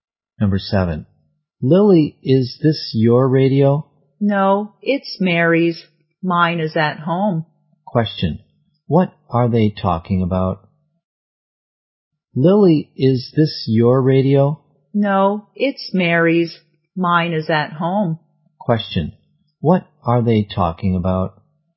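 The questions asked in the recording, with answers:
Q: what are they talking about?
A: A radio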